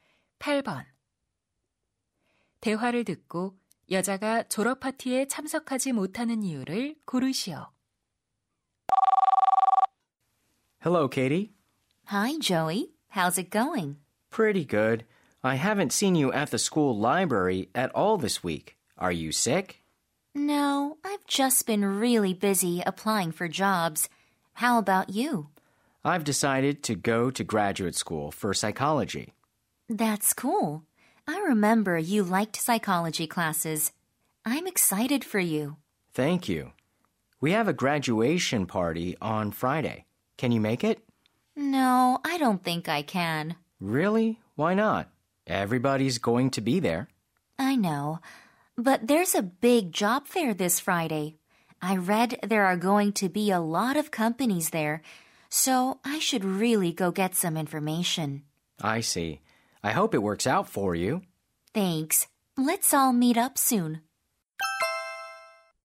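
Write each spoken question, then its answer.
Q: 대화를 듣고 여자가 졸업 파티에 참석하지 못하는 이유를 고르시오.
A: 취업 박람회에 가야 해서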